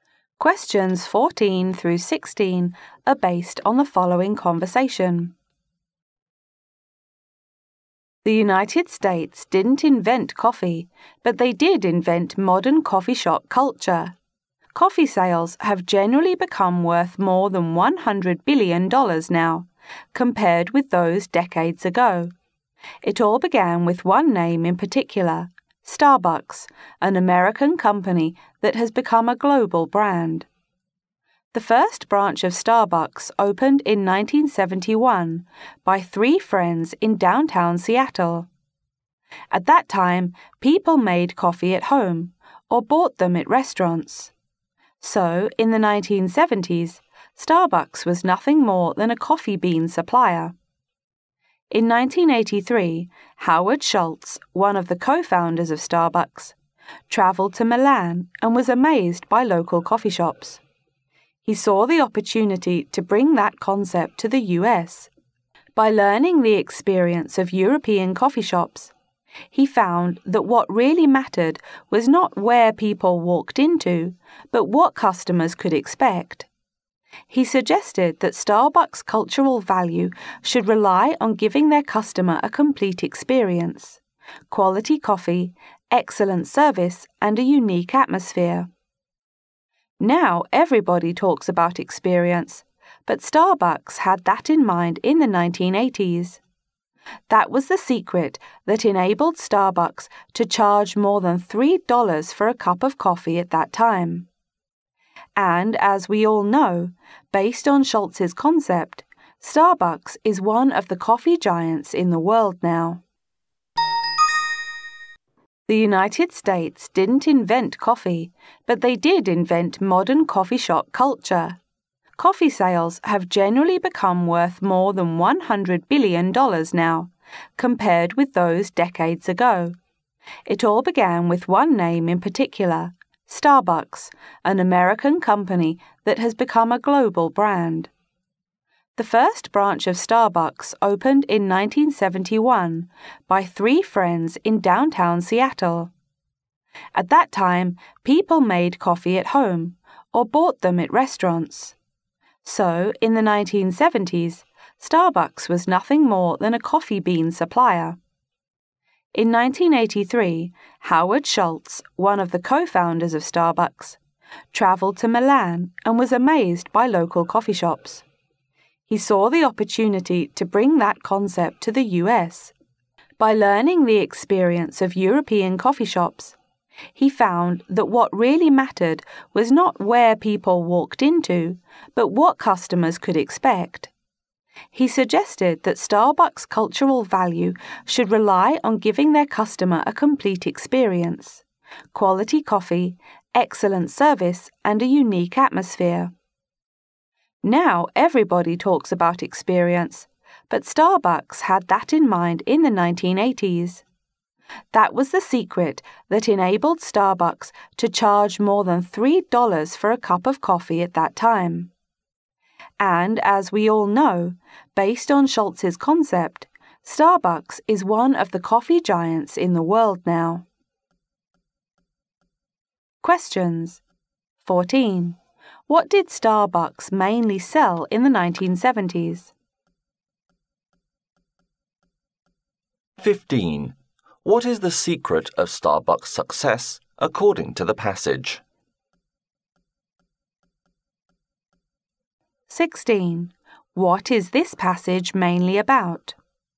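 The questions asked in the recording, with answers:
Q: What did Starbucks mainly sell in the 1970s?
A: Coffee beans

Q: What is the secret of Starbucks' success, according to the passage?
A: Giving customers a complete experience

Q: What is this passage mainly about?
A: How Starbucks created modern coffee shop culture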